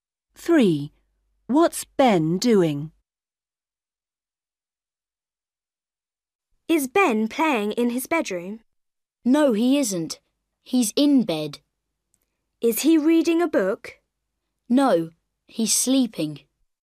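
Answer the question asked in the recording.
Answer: sleeping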